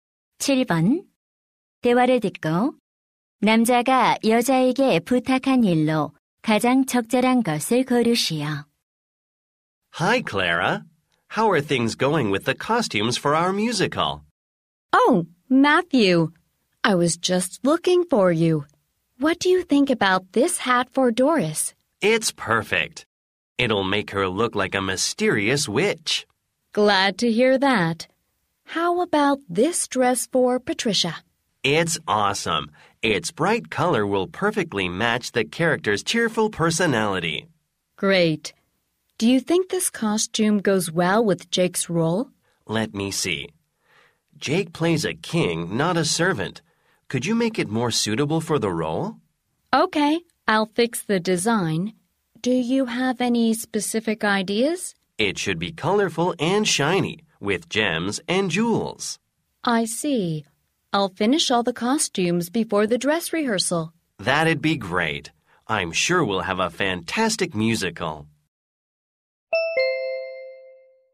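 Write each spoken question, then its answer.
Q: 대화를 듣고 남자가 여자에게 부탁한 일로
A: Jake의 왕 역할 의상 디자인 수정하기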